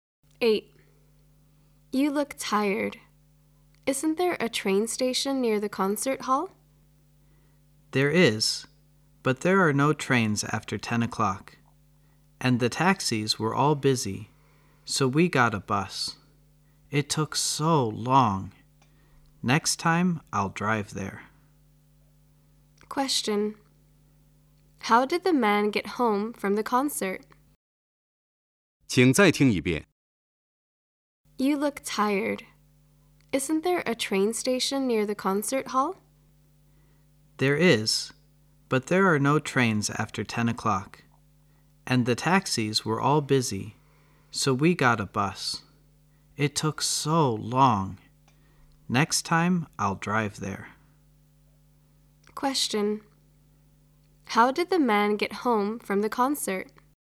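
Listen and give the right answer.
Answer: By bus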